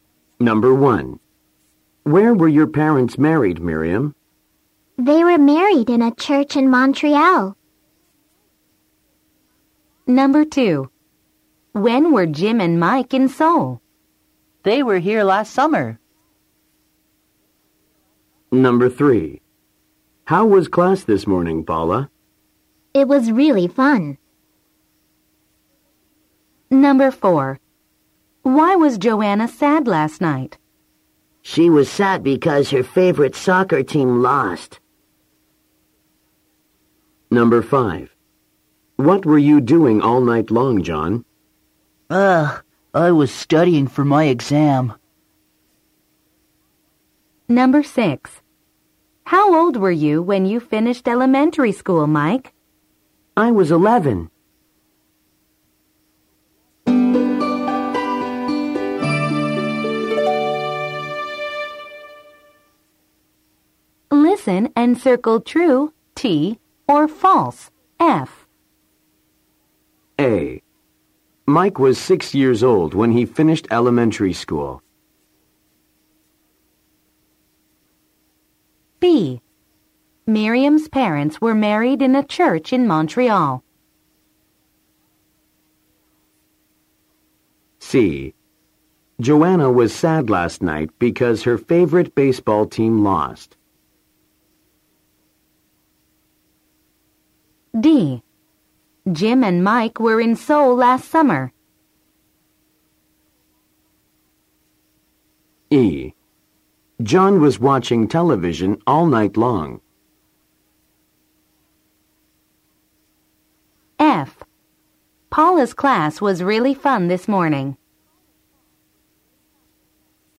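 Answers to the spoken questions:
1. F (false)
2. T (true)
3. F (false)
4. T (true)
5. F (false)
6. T (true)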